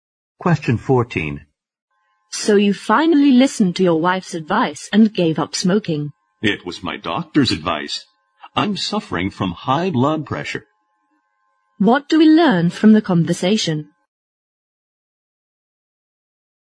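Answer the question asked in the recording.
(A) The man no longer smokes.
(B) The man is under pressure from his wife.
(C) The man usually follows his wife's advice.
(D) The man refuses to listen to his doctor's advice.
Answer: (A) The man no longer smokes.

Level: 四级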